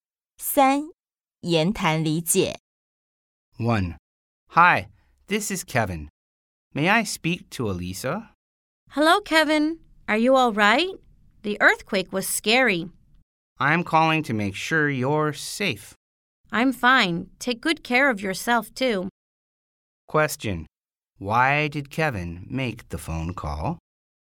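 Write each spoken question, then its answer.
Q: Why did Kevin make the phone call?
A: To make sure Elisa was safe after the earthquake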